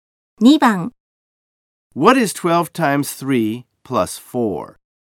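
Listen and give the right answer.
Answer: 40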